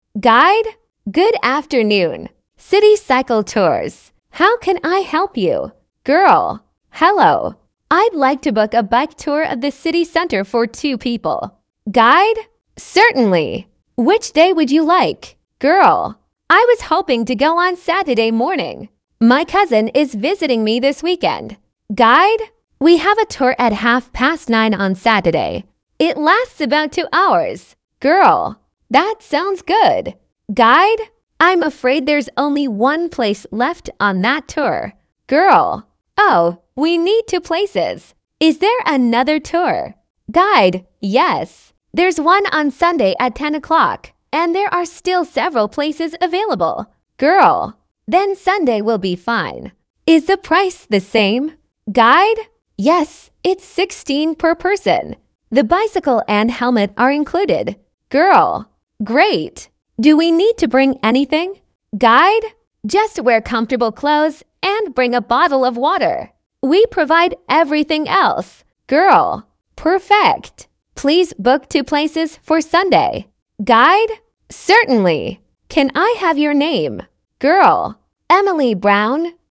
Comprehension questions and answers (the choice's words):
Вы услышите диалог. Для каждого предложения A–E выберите один правильный вариант ответа из трёх предложенных (1, 2 или 3). Вы услышите запись дважды. При повторном прослушивании проверьте себя.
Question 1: The girl wants to book...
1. a bike tour.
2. a boat trip.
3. a walking tour.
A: a bike tour.

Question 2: The girl first wanted to go...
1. on Friday afternoon.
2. on Saturday morning.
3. on Sunday morning.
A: on Saturday morning.

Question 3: The girl finally chooses Sunday because...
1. the Saturday tour is full.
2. Sunday is cheaper.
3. her cousin cannot come on Saturday.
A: the Saturday tour is full.

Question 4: The girl needs to bring...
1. a helmet.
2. a bottle of water.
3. a bicycle.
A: a bottle of water.

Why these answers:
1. Девушка хочет забронировать велосипедную экскурсию по центру города.
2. Изначально она хотела отправиться на экскурсию утром в субботу.
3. Девушка выбирает воскресенье, потому что на субботней экскурсии осталось только одно место, а ей нужны два.
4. Велосипед и шлем предоставляет организатор. С собой необходимо взять бутылку воды.

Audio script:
Guide: Good afternoon. City Cycle Tours. How can I help you?
Girl: Hello. I'd like to book a bike tour of the city centre for two people.
Guide: Certainly. Which day would you like?
Girl: I was hoping to go on Saturday morning. My cousin is visiting me this weekend.
Guide: We have a tour at half past nine on Saturday. It lasts about two hours.
Girl: That sounds good.
Guide: I'm afraid there's only one place left on that tour.
Girl: Oh, we need two places. Is there another tour?
Guide: Yes. There's one on Sunday at ten o'clock, and there are still several places available.
Girl: Then Sunday will be fine. Is the price the same?
Guide: Yes, it's £16 per person. The bicycle and helmet are included.
Girl: Great. Do we need to bring anything?
Guide: Just wear comfortable clothes and bring a bottle of water. We provide everything else.
Girl: Perfect. Please book two places for Sunday.
Guide: Certainly. Can I have your name?
Girl: Emily Brown.